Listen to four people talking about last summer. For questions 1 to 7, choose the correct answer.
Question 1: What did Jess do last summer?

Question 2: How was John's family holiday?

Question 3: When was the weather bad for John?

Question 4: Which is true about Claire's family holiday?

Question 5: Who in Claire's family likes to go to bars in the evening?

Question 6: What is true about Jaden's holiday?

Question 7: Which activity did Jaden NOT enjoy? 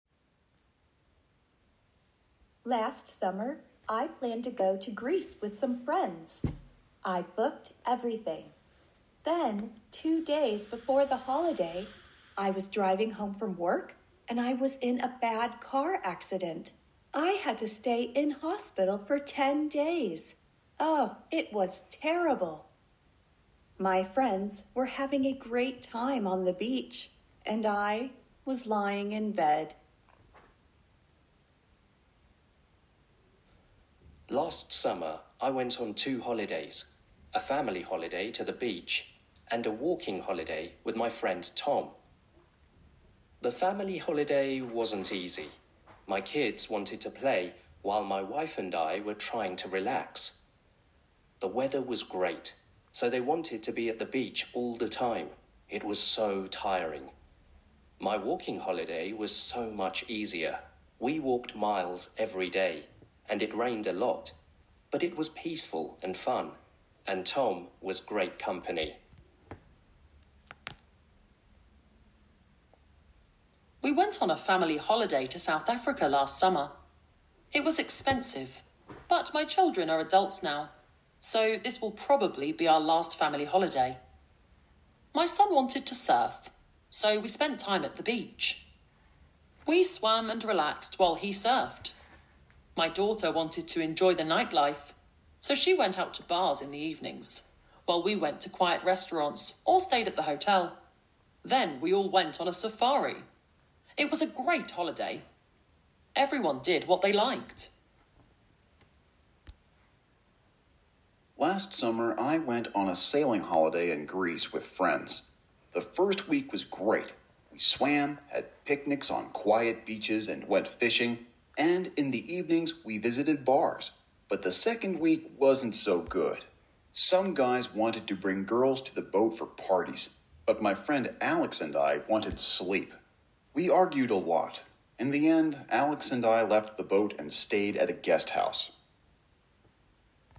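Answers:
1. She was in hospital for 10 days after a car accident
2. Not easy, very tiring
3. On his walking holiday with Tom
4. It was expensive and probably their last family holiday; everyone did what they liked
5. Her daughter
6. The first week was great but the second week wasn't so good
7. The parties on the boat

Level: Level A1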